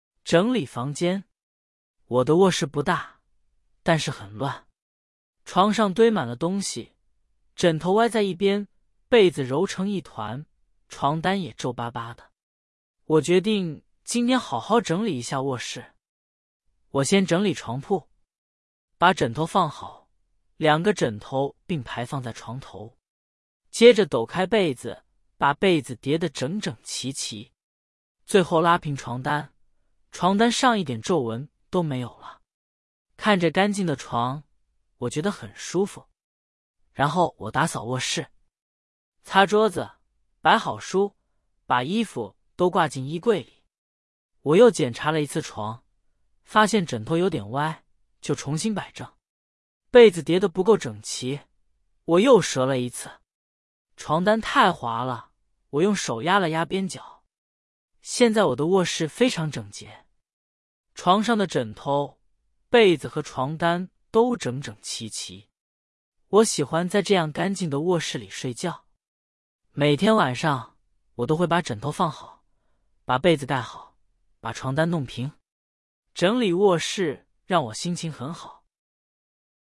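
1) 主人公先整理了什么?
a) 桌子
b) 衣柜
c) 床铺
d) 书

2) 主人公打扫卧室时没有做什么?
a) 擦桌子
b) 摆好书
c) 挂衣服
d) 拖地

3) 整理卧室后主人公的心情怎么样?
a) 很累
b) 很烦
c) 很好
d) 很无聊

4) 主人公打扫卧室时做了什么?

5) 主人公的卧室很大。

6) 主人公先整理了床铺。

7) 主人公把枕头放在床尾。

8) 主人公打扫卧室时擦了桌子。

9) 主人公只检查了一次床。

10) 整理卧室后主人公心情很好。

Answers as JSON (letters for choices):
{"1": "c", "2": "d", "3": "c", "4": "擦桌子,摆好书,把衣服挂进衣柜里", "5": "False", "6": "True", "7": "False", "8": "True", "9": "False", "10": "True"}

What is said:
整理房间
我的卧室不大,但是很乱。床上堆满了东西,枕头歪在一边,被子揉成一团,床单也皱巴巴的。我决定今天好好整理一下卧室。
我先整理床铺。把枕头放好,两个枕头并排放在床头。接着抖开被子,把被子叠得整整齐齐。最后拉平床单,床单上一点皱纹都没有了。看着干净的床,我觉得很舒服。
然后我打扫卧室。擦桌子,摆好书,把衣服都挂进衣柜里。我又检查了一次床,发现枕头有点歪,就重新摆正。被子叠得不够整齐,我又折了一次。床单太滑了,我用手压了压边角。
现在我的卧室非常整洁。床上的枕头、被子和床单都整整齐齐。我喜欢在这样干净的卧室里睡觉。每天晚上,我都会把枕头放好,把被子盖好,把床单弄平。整理卧室让我心情很好。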